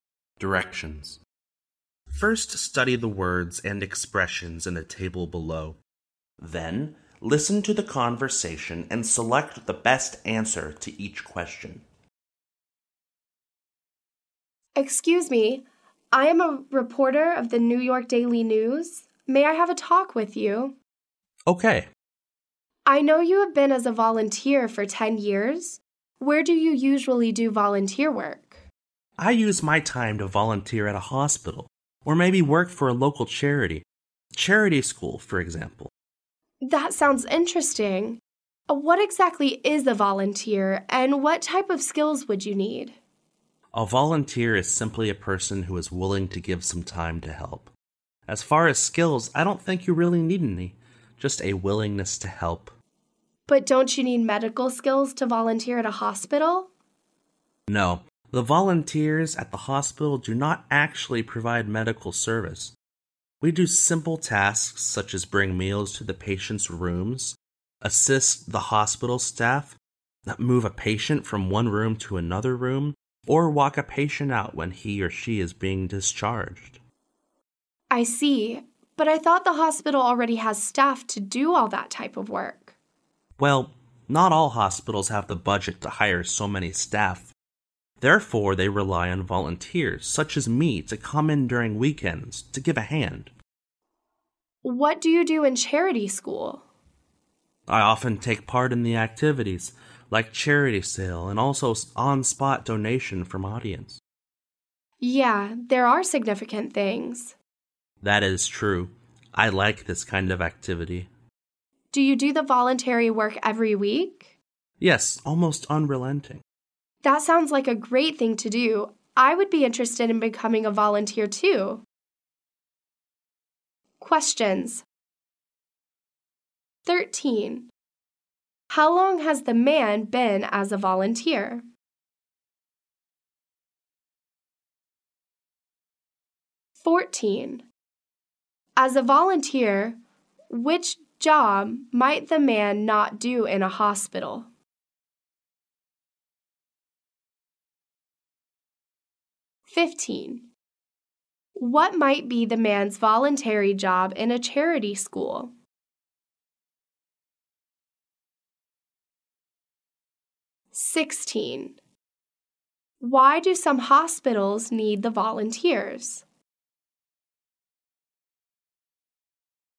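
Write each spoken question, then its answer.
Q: How long has the man been as a volunteer?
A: 10 years

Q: As a volunteer, which job might the man not do in a hospital?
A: Provide medical service

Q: What might be the man's voluntary job in a charity school?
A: Taking part in activities like charity sales and on-the-spot donations

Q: Why do some hospitals need the volunteers?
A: They don't have the budget to hire enough staff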